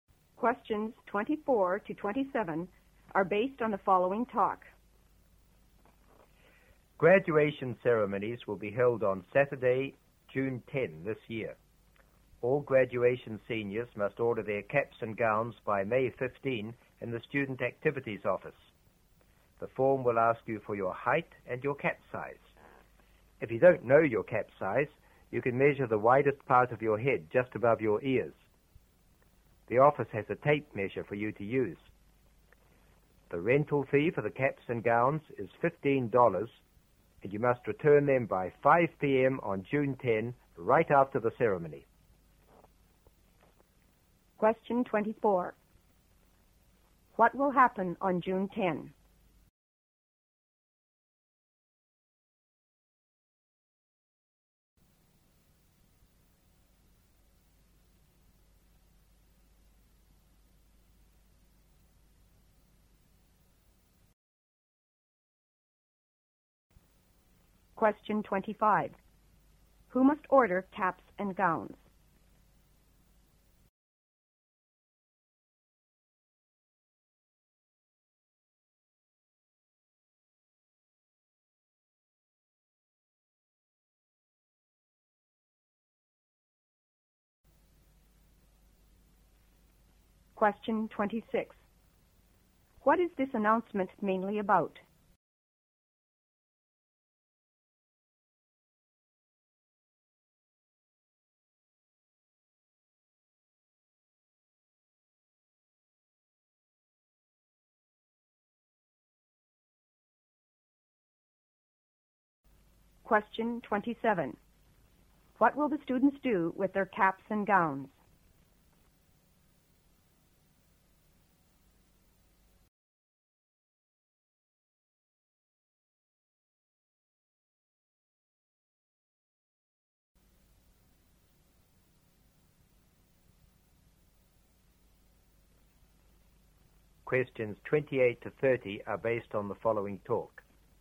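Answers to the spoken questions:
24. The graduation ceremony
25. All graduating seniors
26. Ordering caps and gowns for graduation
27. Rent them, wear them at graduation and return them by 5 p.m. on June 10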